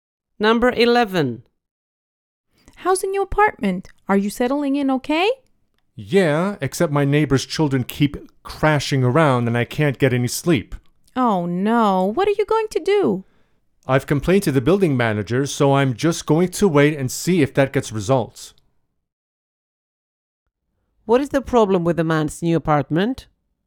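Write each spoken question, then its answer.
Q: What is the problem with the man's new apartment?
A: The neighbor's children are noisy and he can't sleep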